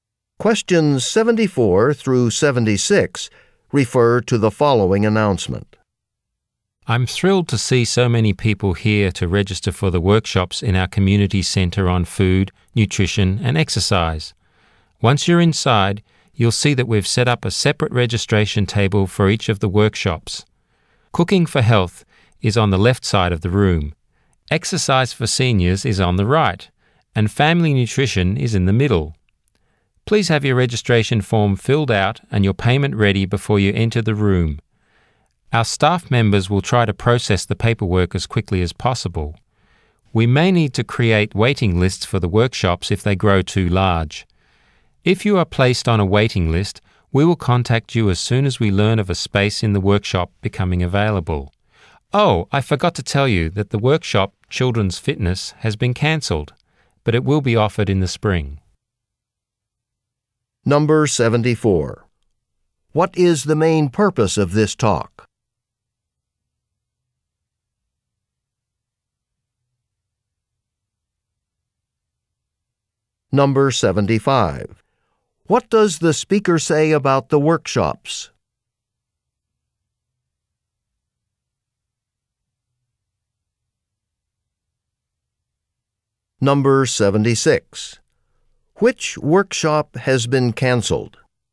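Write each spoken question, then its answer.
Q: Which workshop has been cancelled?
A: Children's Fitness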